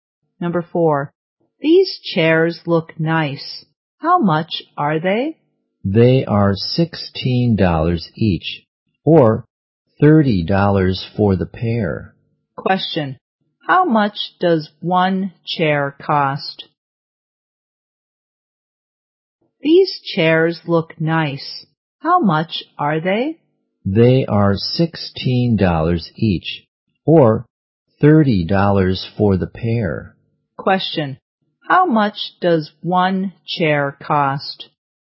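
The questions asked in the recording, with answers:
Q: Question, how much does one chair cost?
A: $16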